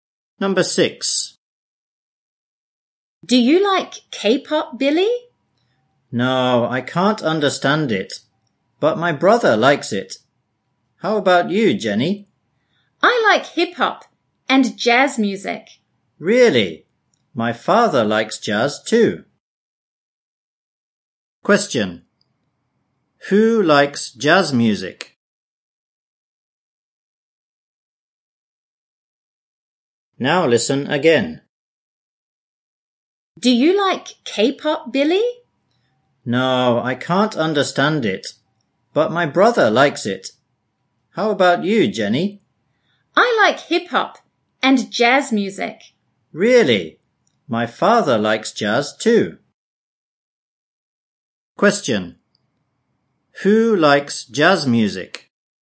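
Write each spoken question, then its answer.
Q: Who likes jazz music?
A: Jenny and Billy's father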